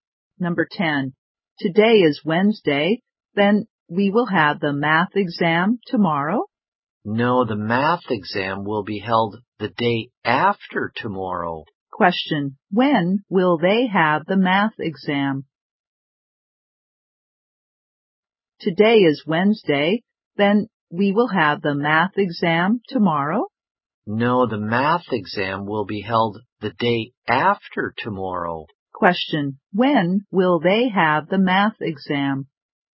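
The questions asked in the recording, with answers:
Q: Question. When will they have the math exam?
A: On Friday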